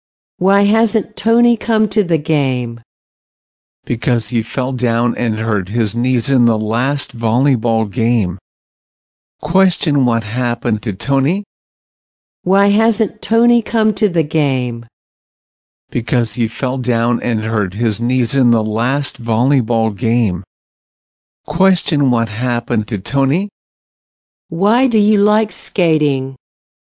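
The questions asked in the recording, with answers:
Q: Question, what happened to Tony?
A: He fell down and hurt his knees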